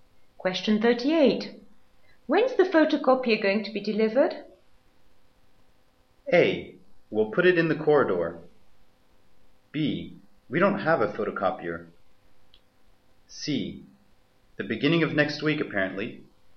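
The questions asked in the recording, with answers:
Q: When's the photocopier going to be delivered?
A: C: The beginning of next week, apparently.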